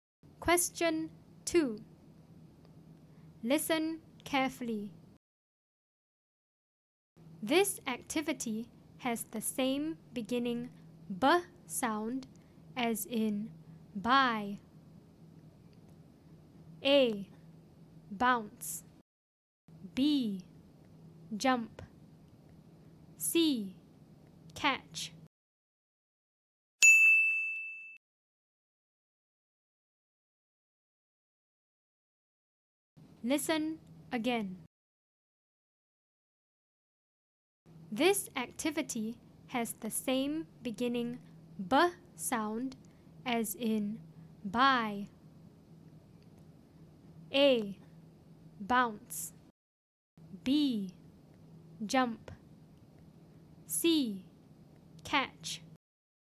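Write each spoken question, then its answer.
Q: This activity has the same beginning b sound as in buy.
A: A: Bounce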